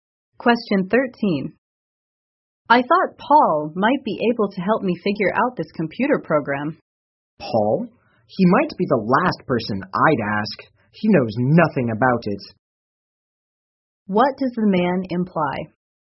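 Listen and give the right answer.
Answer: Paul knows nothing about the computer program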